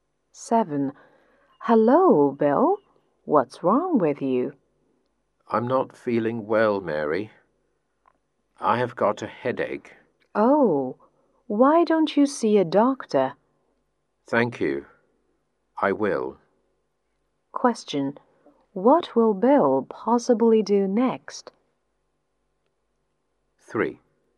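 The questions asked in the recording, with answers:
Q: What will Bill possibly do next?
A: See a doctor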